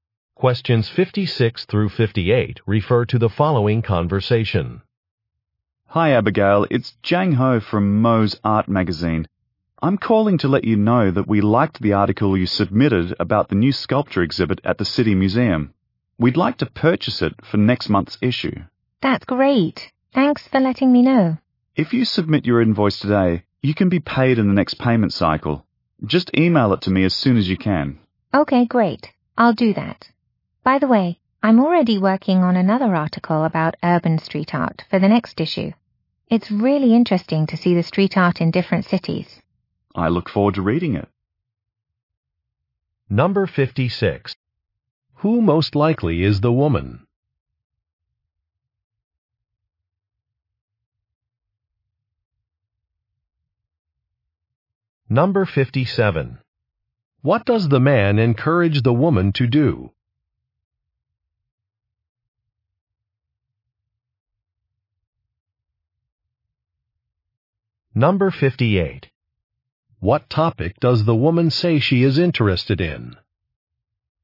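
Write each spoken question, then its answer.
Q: Who most likely is the woman?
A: A writer

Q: What does the man encourage the woman to do?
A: Submit her invoice today

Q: What topic does the woman say she is interested in?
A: Urban street art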